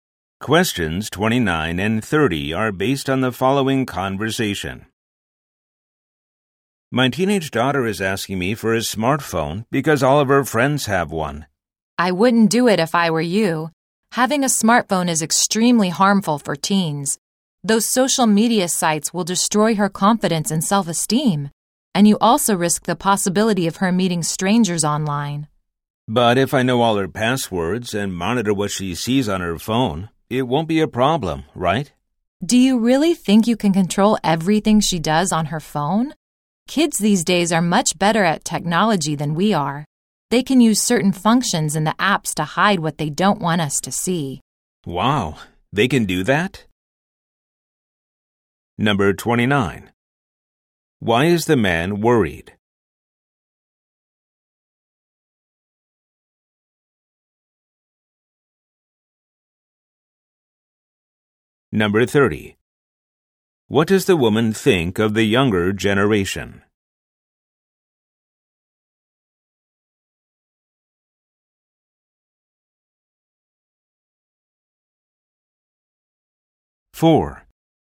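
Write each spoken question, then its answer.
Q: What does the woman think of the younger generation?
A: Kids are much better at technology than adults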